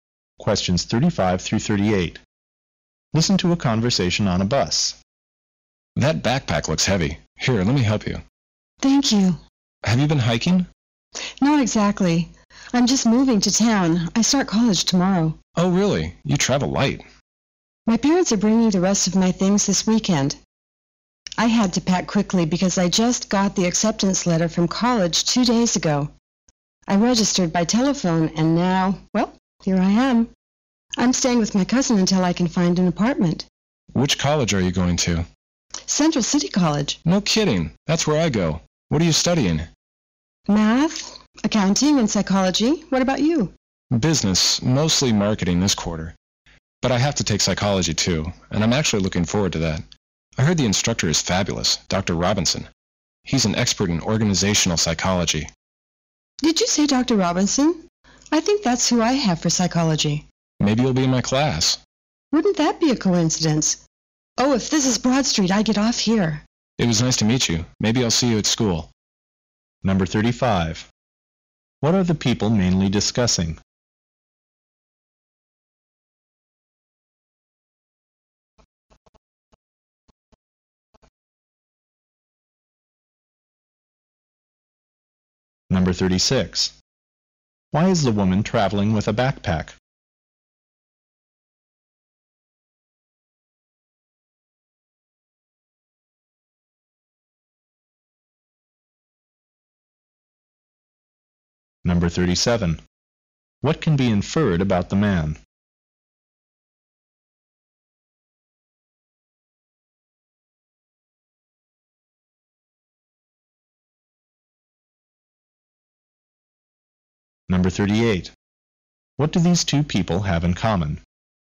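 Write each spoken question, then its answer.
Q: What are the people mainly discussing?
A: Starting at college and their classes.

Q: Why is the woman traveling with a backpack?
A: She is moving to town to start college; her parents will bring the rest of her things.

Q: What do these two people have in common?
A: They go to the same college and may both have Dr. Robinson for psychology.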